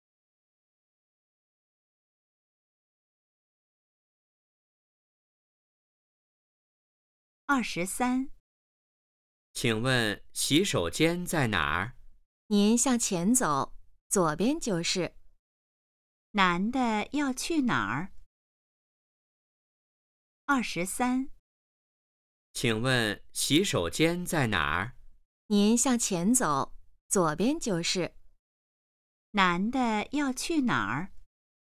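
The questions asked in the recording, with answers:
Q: 男的要去哪儿?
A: 洗手间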